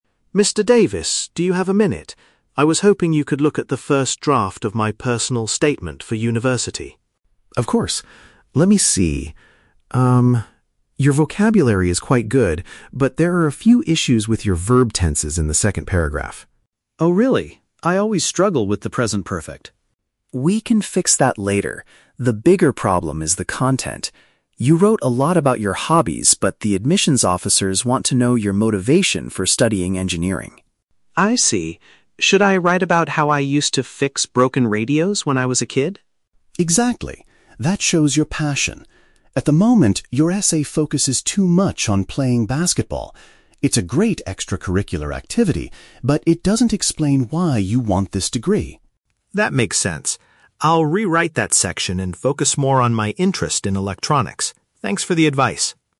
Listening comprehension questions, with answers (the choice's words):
Listen to the conversation between a high school student and his English teacher. Read the questions below and choose the correct answer (A, B, or C) for each.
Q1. What does the teacher say about the language used in the essay?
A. The vocabulary is good, but there are errors with the time expressions.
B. The essay is completely perfect and ready to be submitted.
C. The sentences are too long and the spelling is incorrect.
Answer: The vocabulary is good, but there are errors with the time expressions.

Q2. What is the main weakness of the current draft, according to the teacher?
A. It includes too many details about repairing old electronics.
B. It does not clearly explain the student's reason for choosing the major.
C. It is too short to be accepted by the university admissions office.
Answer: It does not clearly explain the student's reason for choosing the major.

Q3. What will the student probably focus on in his next draft?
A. His experiences playing on a sports team.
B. His future plans to become an English teacher.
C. His childhood fascination with fixing devices.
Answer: His childhood fascination with fixing devices.

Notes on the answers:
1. The Key (Correct): The teacher says, "your vocabulary is quite good, but there are a few issues with your verb tenses." (Paraphrased: issues = errors, verb tenses = time expressions). The Trap: Option (B) is incorrect because the teacher explicitly points out mistakes. Not mentioned: Option (C) is plausible for a writing task, but spelling and sentence length are never mentioned.
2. The Key (Correct): The teacher says the essay "doesn't explain why you want this degree" and that the student needs to show his "motivation for studying engineering." (Paraphrased: reason for choosing the major). The Trap: Option (A) is incorrect. The student suggests writing about repairing electronics, which the teacher agrees is a good idea. It is not the weakness of the current draft. Not mentioned: Option (C) is a common essay problem, but the length of the essay is not discussed.
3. The Key (Correct): The student decides to rewrite the section to "focus more on my interest in electronics," specifically how he "used to fix broken radios when I was a kid." (Paraphrased: fixing devices = fixing radios/electronics). The Trap: Option (A) is incorrect. The teacher tells him that his current draft focuses "too much on playing basketball" (sports team) and that he needs to change it. Not mentioned: Option (B) is a distractor because he is talking to his English teacher, but his major is engineering, not English.

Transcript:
Student: Mr. Davis, do you have a minute? I was hoping you could look at the first draft of my personal statement for university.
Teacher: Of course. Let me see... Um, your vocabulary is quite good, but there are a few issues with your verb tenses in the second paragraph.
Student: Oh, really? I always struggle with the present perfect.
Teacher: We can fix that later. The bigger problem is the content. You wrote a lot about your hobbies, but the admissions officers want to know your motivation for studying engineering.
Student: I see. Should I write about how I used to fix broken radios when I was a kid?
Teacher: Exactly! That shows your passion. At the moment, your essay focuses too much on playing basketball. It's a great extracurricular activity, but it doesn't explain why you want this degree.
Student: That makes sense. I'll rewrite that section and focus more on my interest in electronics. Thanks for the advice!